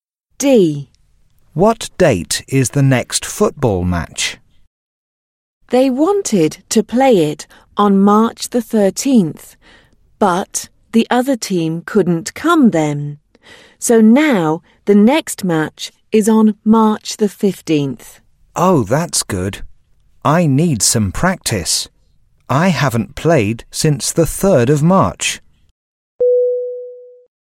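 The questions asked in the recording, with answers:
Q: What date is the next football match?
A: March the 15th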